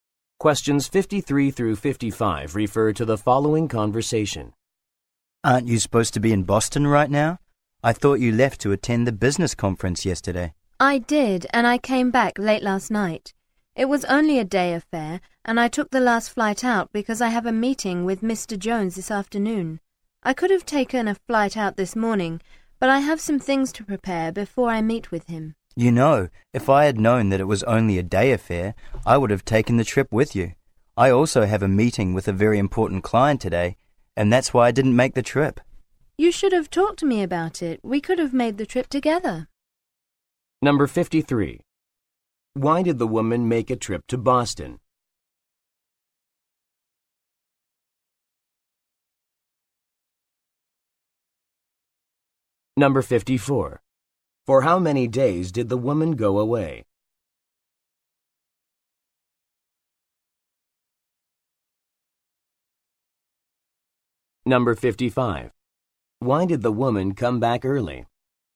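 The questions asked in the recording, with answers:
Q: Why did the woman make a trip to Boston?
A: To attend a business conference

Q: For how many days did the woman go away?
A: One day

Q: Why did the woman come back early?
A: She has a meeting with Mr. Jones this afternoon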